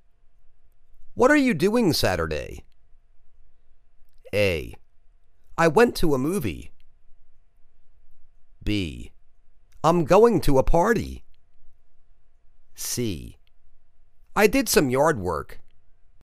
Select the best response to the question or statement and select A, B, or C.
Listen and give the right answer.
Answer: I' m going to a party